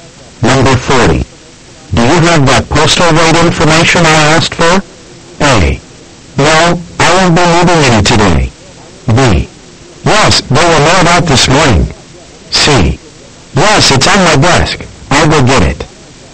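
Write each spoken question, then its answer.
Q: Do you have that postal rate information I asked for?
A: C: Yes, it's on my desk. I'll go get it.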